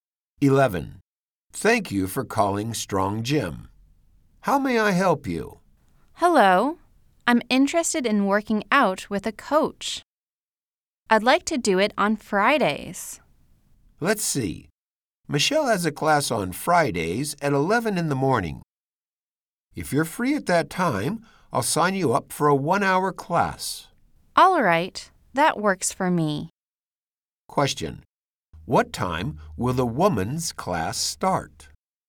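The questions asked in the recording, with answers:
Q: What time will the woman's class start?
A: At 11 in the morning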